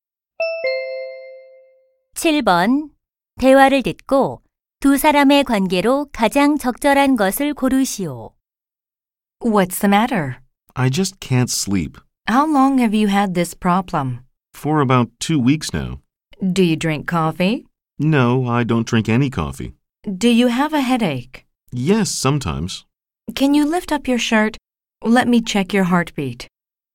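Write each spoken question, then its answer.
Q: 대화를 듣고 두 사람의 관계로 가장 적절한 것을 고르시오.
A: 의사와 환자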